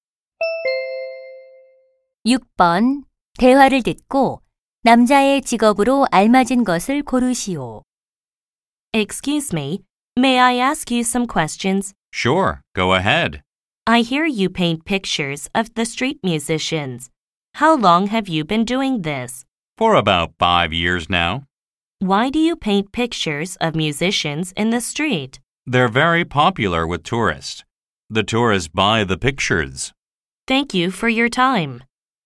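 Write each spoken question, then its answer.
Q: 대화를 듣고 남자의 직업으로 알맞은 것을 고르시오.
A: 화가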